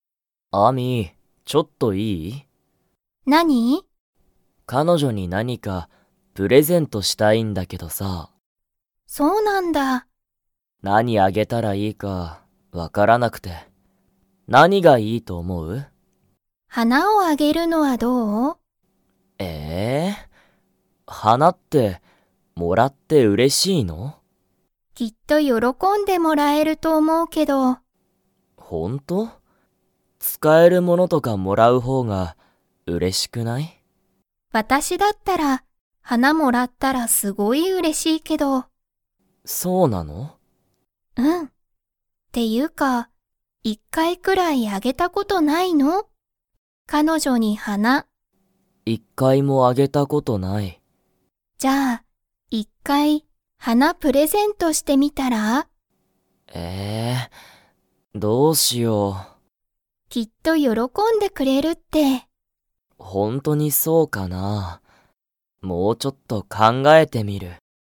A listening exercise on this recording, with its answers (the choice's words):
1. アミは、 をもらったら嬉(うれ)しい。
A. 本(ほん)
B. 花(はな)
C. 動物(どうぶつ)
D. バッグ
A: 花(はな)

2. タケシは彼女(かのじょ)に花(はな)をあげたことがありますか?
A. はい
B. いいえ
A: いいえ

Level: Level 3